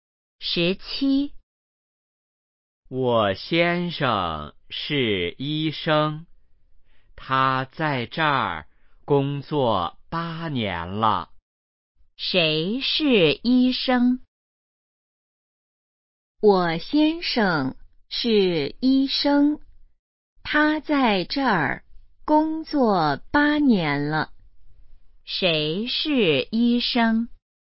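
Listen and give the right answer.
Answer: 我先生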